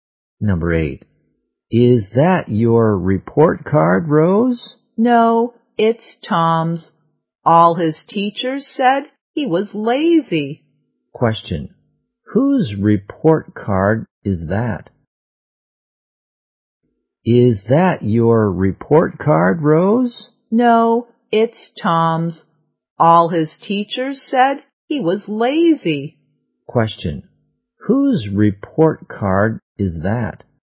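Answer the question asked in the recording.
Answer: Tom's.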